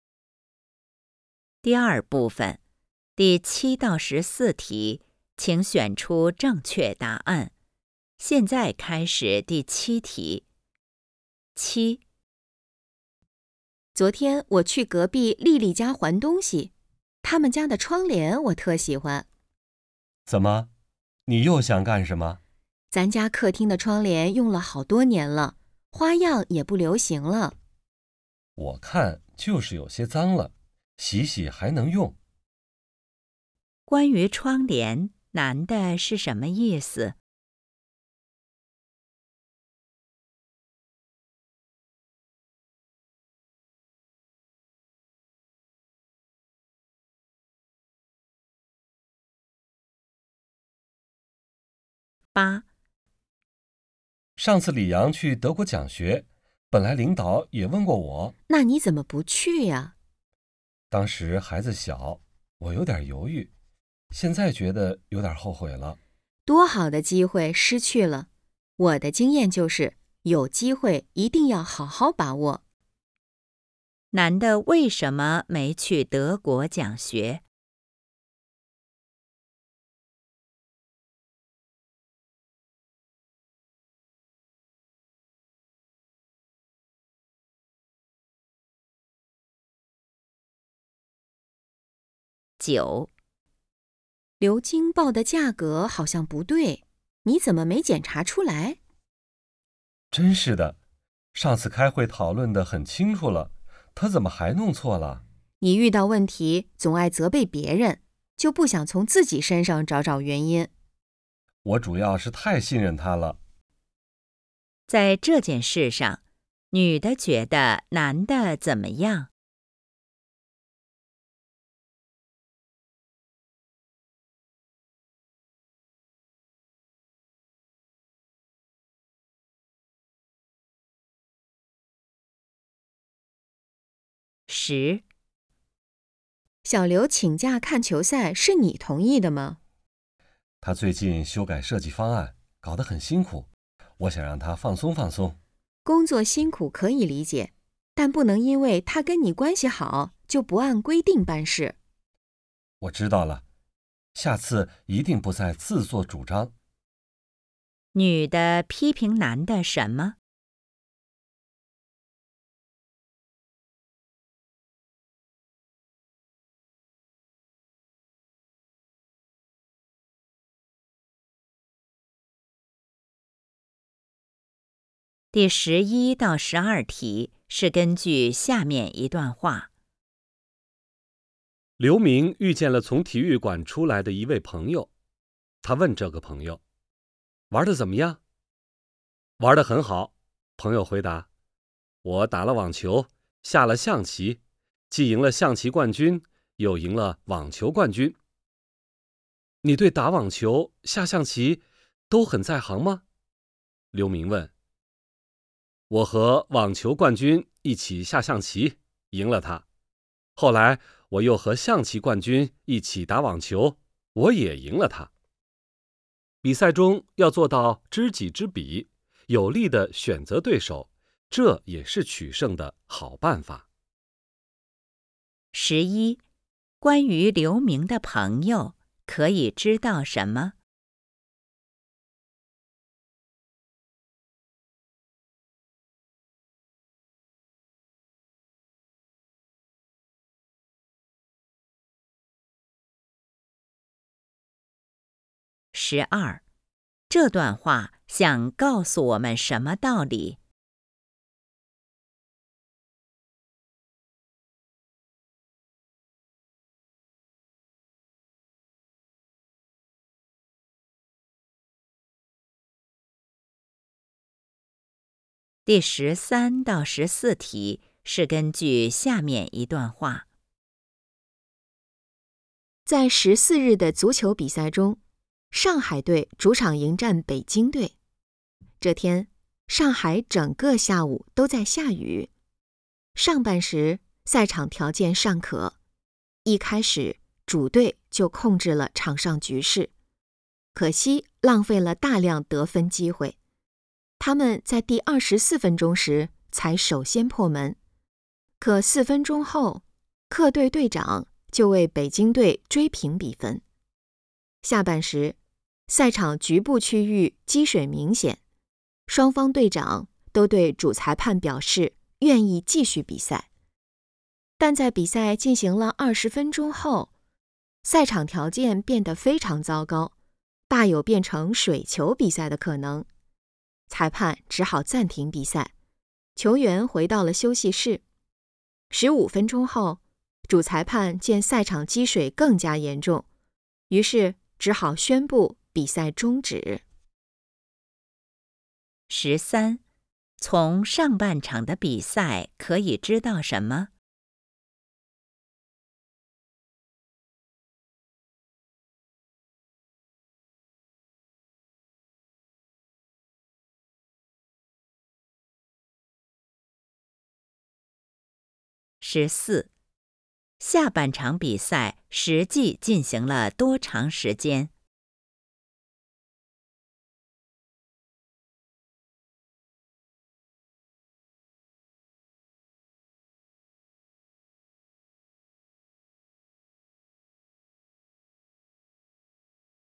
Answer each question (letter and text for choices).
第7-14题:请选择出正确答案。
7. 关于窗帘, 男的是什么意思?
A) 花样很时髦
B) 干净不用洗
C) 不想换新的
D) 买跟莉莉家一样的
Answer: C) 不想换新的

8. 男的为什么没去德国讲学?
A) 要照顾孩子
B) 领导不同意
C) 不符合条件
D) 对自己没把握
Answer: A) 要照顾孩子

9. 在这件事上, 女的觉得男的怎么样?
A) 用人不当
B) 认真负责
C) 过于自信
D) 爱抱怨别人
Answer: D) 爱抱怨别人

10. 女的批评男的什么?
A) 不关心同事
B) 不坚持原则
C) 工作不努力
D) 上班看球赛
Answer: B) 不坚持原则

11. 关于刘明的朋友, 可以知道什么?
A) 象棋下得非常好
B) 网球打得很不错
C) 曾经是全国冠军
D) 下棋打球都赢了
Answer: D) 下棋打球都赢了

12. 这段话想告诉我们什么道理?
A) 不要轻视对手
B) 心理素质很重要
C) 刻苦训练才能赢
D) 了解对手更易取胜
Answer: D) 了解对手更易取胜

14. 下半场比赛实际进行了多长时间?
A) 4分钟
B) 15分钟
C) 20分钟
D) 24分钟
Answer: C) 20分钟

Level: HSK 5